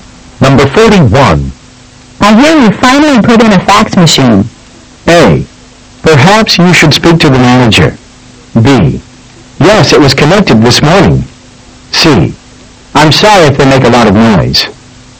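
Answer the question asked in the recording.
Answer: B: Yes, it was connected this morning.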